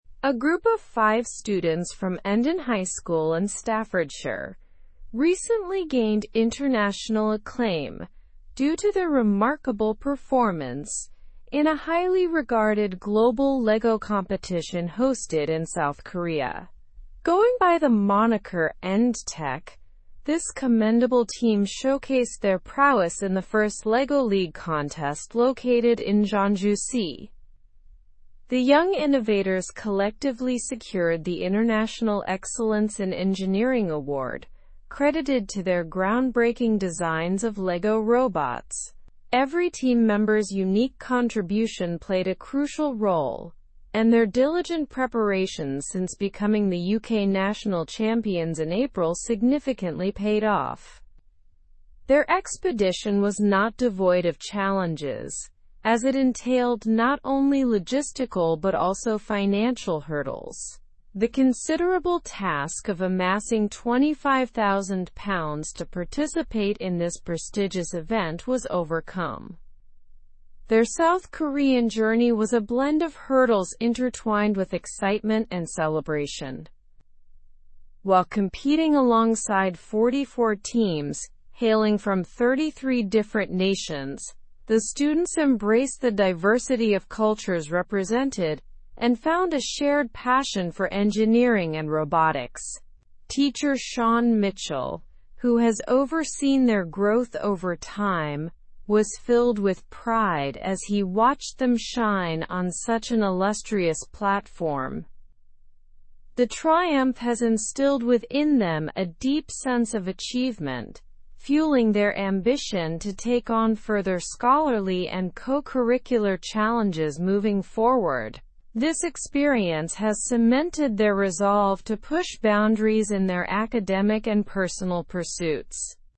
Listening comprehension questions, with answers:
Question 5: How many countries were represented in the competition?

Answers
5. Teams from 33 different countries participated.

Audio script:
A group of five students from Endon High School in Staffordshire recently gained international acclaim due to their remarkable performance in a highly regarded global Lego competition hosted in South Korea. Going by the moniker End-Tech, this commendable team showcased their prowess in the First Lego League contest located in Jeonju-si.
The young innovators collectively secured the International Excellence in Engineering Award, credited to their groundbreaking designs of Lego robots. Every team member's unique contribution played a crucial role, and their diligent preparations since becoming the UK national champions in April significantly paid off.
Their expedition was not devoid of challenges, as it entailed not only logistical but also financial hurdles. The considerable task of amassing £25,000 to participate in this prestigious event was overcome. Their South Korean journey was a blend of hurdles intertwined with excitement and celebration.
While competing alongside 44 teams hailing from 33 different nations, the students embraced the diversity of cultures represented and found a shared passion for engineering and robotics. Teacher Shaun Mitchell, who has overseen their growth over time, was filled with pride as he watched them shine on such an illustrious platform.
The triumph has instilled within them a deep sense of achievement, fueling their ambition to take on further scholarly and co-curricular challenges moving forward. This experience has cemented their resolve to push boundaries in their academic and personal pursuits.

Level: Level 4